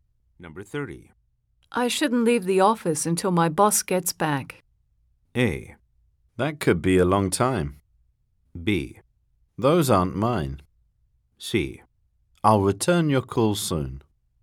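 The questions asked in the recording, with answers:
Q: I shouldn't leave the office until my boss gets back.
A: A: That could be a long time.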